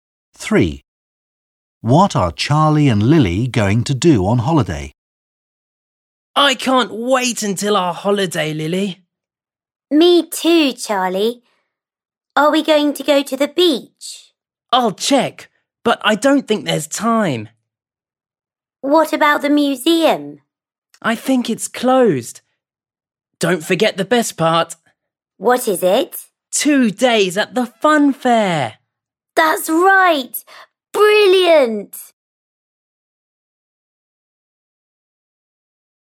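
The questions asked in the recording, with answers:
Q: What are Charlie and Lily going to do on holiday?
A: go to the fun fair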